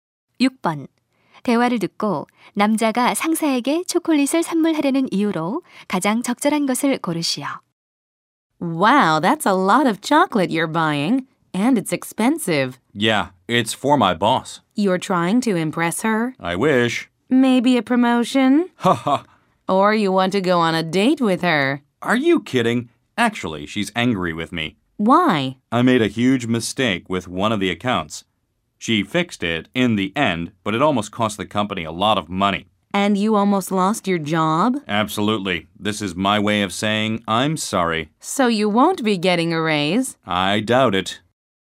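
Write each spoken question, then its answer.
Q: 대화를 듣고 남자가 상사에게 초콜릿을 선물하려는 이유로 가장 적절한 것을 고르시오.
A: 실수에 대해 사과하려고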